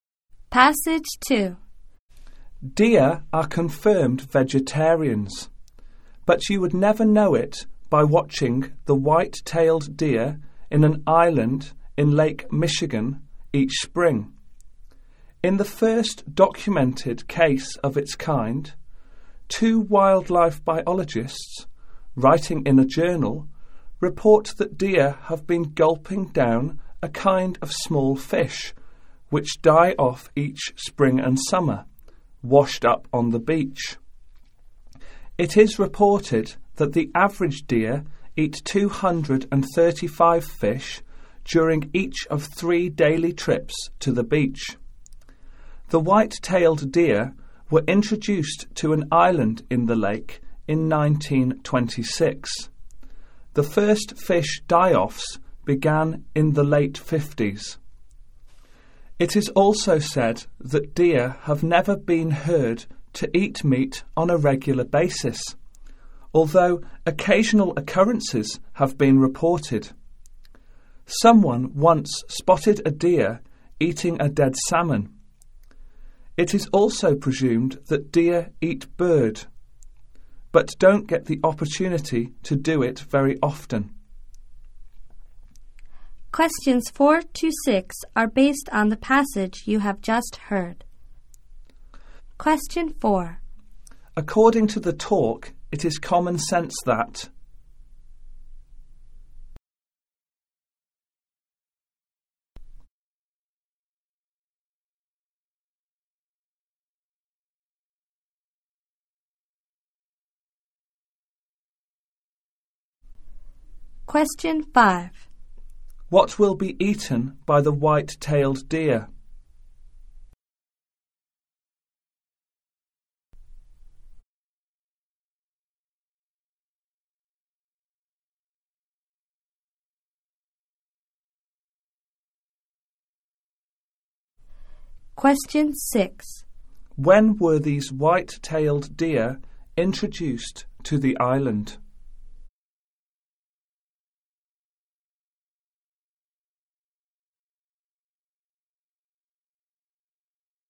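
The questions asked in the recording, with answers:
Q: What will be eaten by the white-tailed deer?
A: Small dead fish washed up on the beach.

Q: When were these white-tailed deer introduced to the island?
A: In 1926.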